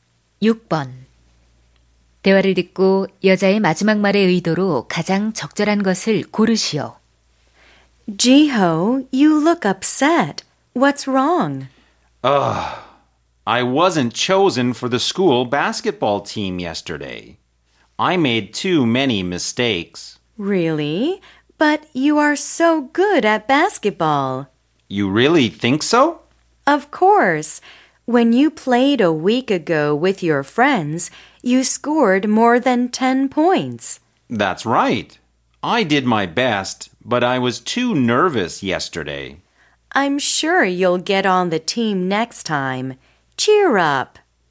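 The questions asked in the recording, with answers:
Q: 대화를 듣고 여자의 마지막 말의 의도로 가장 적절한 것을 고르시오.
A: 격려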